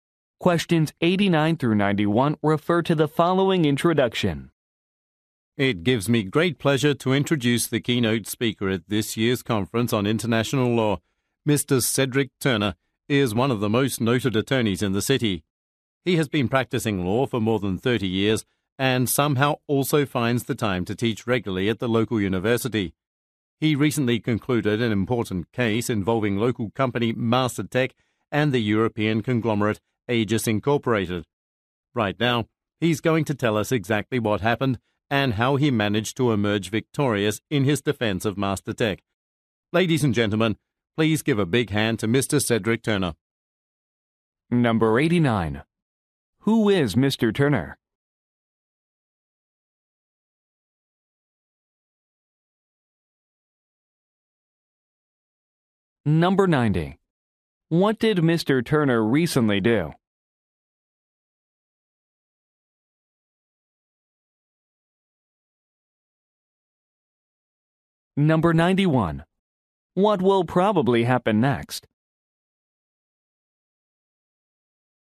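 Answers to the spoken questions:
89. An attorney
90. He won a case defending MasterTech
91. Mr. Turner will give a speech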